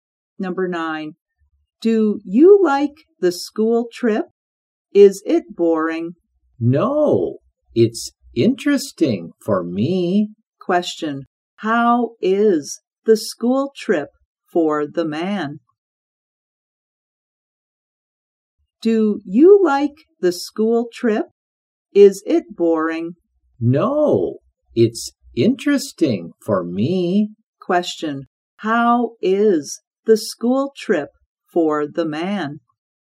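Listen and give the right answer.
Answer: Interesting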